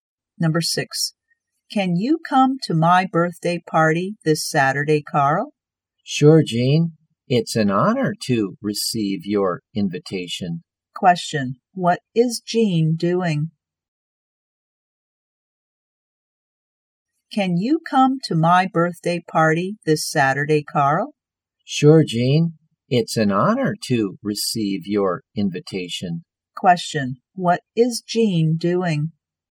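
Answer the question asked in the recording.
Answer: Inviting Carl to her birthday party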